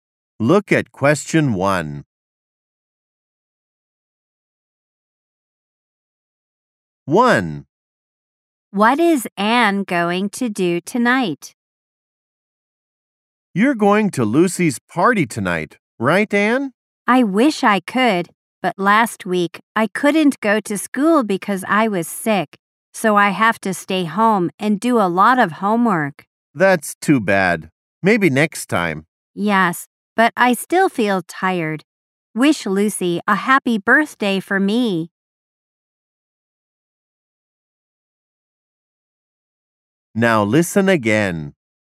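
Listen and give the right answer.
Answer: Stay home and do homework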